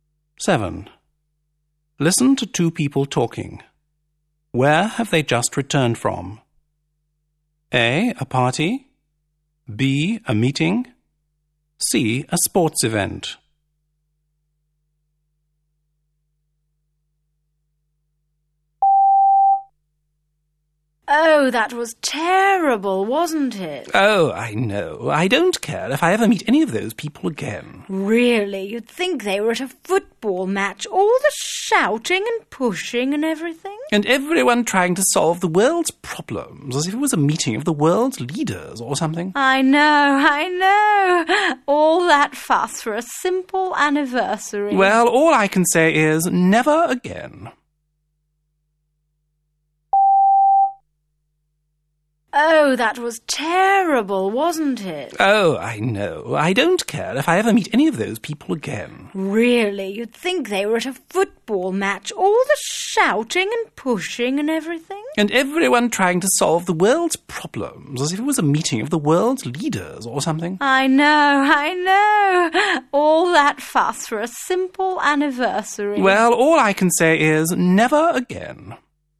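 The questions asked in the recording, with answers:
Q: Where have they just returned from?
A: A: A party.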